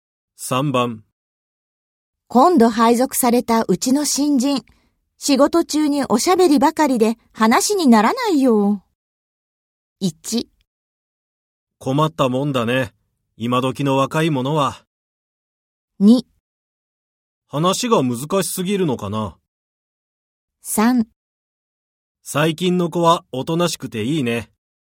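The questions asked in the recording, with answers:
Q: 今度配属されたうちの新人、仕事中におしゃべりばかりで話にならないよ。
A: 1: 困ったもんだね、今時の若いものは。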